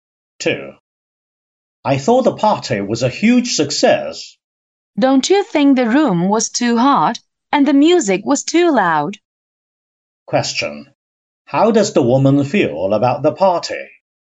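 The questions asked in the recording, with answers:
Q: How does the woman feel about the party?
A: She didn't enjoy it; the room was too hot and the music too loud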